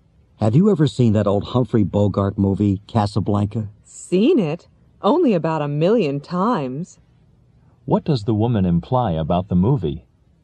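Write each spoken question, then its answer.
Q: What does the woman imply about the movie?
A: She has seen it many times.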